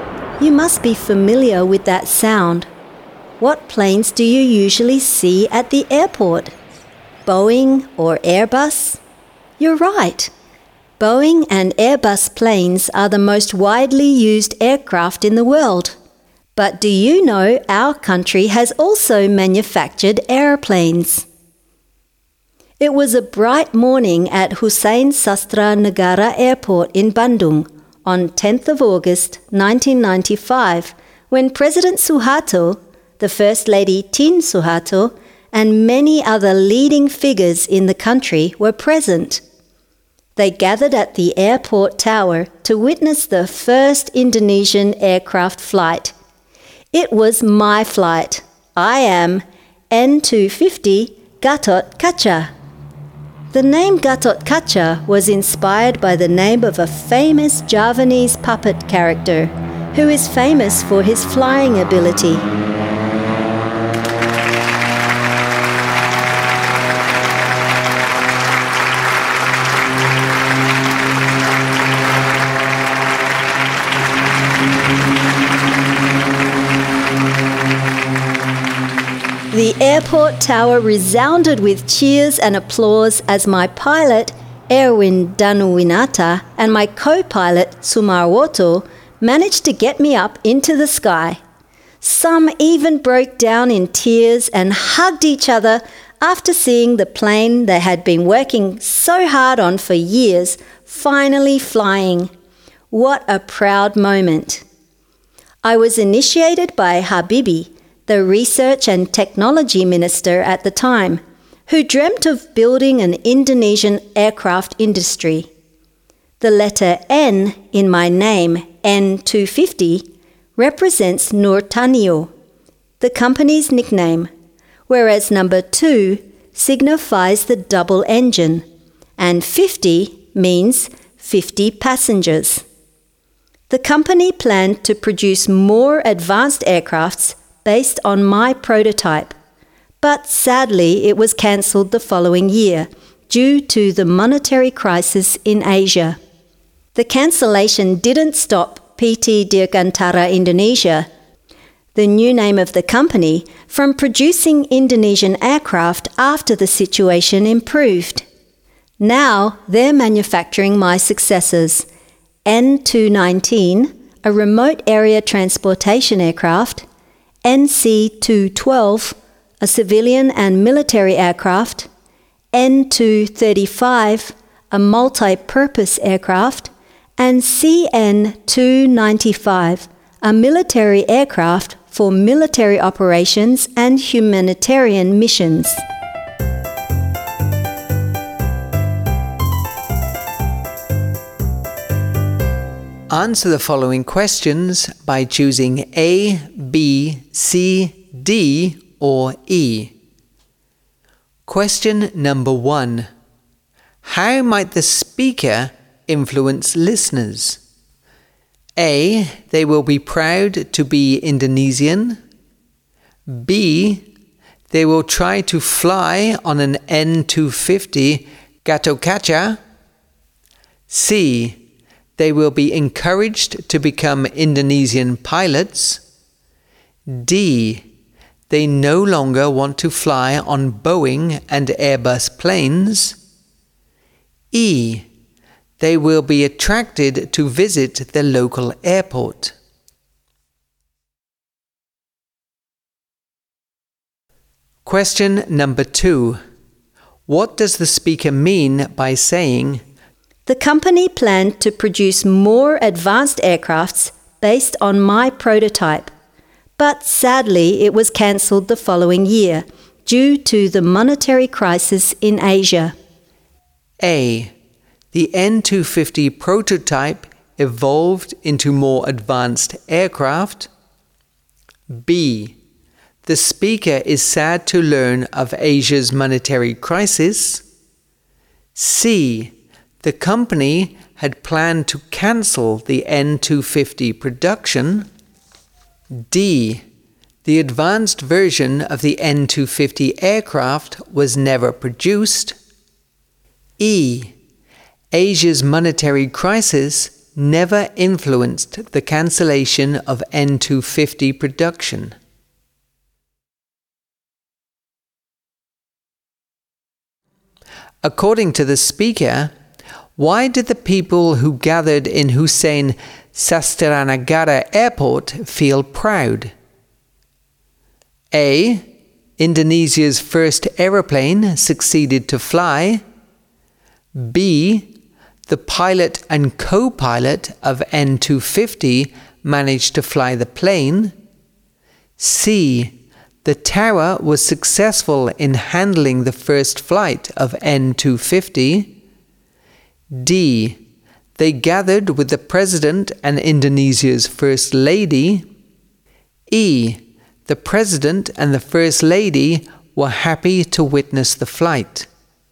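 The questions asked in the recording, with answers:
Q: How might the speaker influence listeners?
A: A: They will be proud to be Indonesian.

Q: What does the speaker mean by saying,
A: D: The advanced version of the N250 aircraft was never produced.

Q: According to the speaker, why did the people who gathered in Hussein Sastranagara Airport feel proud?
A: A: Indonesia's first aeroplane succeeded to fly.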